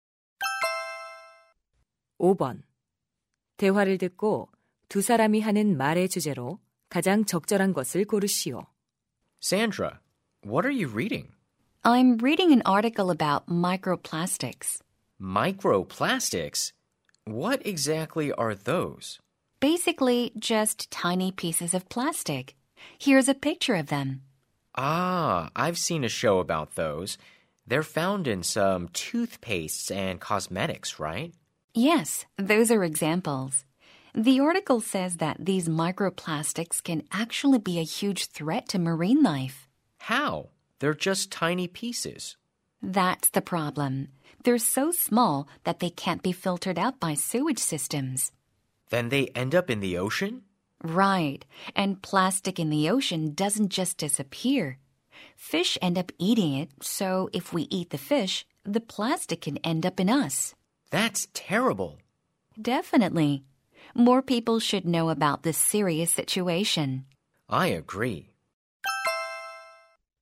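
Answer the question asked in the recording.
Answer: 미세 플라스틱이 해양 생물에 미치는 위험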